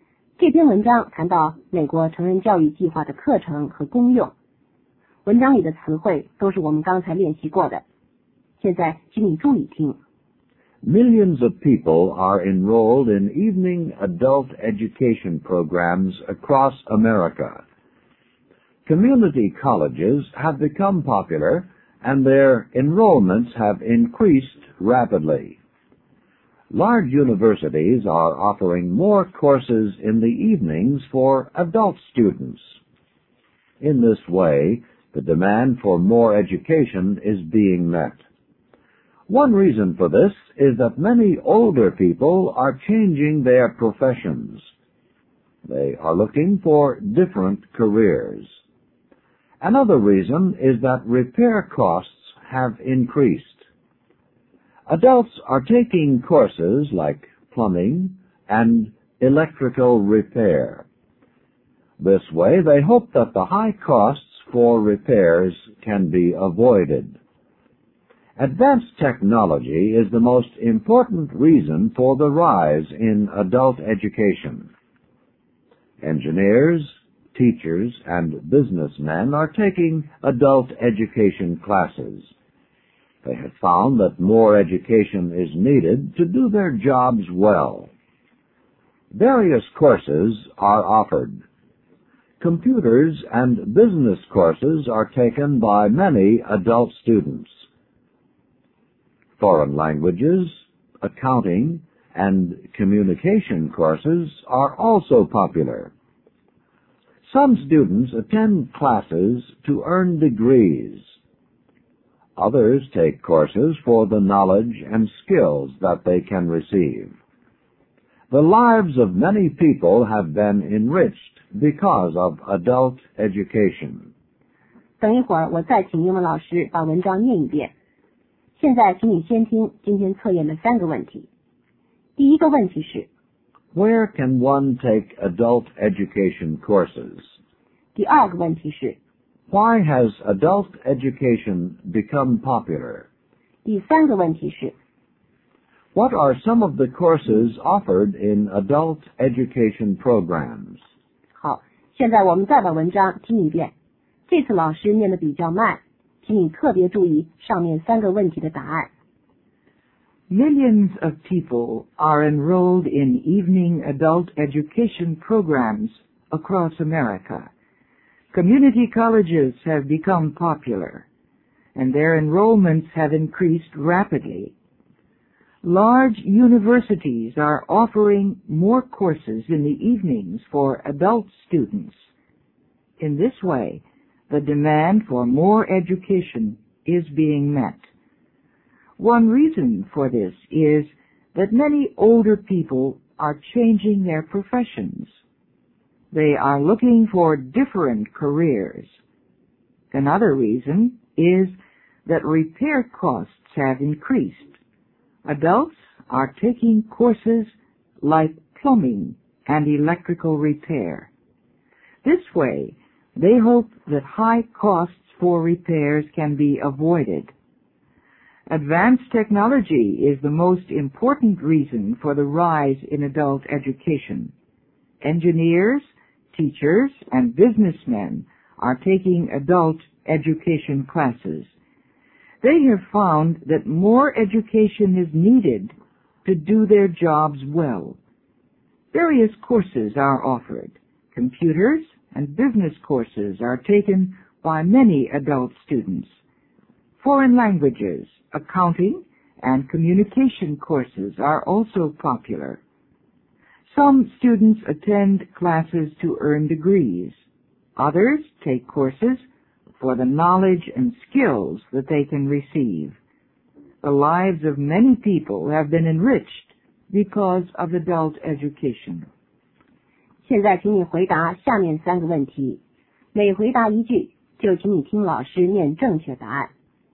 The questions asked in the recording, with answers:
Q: Where can one take adult education courses?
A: One can take adult education courses in a community college or university.

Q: Why has adult education become popular?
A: Changing professions, high costs for repairs, and advanced technology are some of the reasons for the rise in adult education.

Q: What are some of the courses offered in adult education programs?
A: Plumbing, electrical repair, foreign languages, accounting, and communication are some of the courses offered in adult education programs.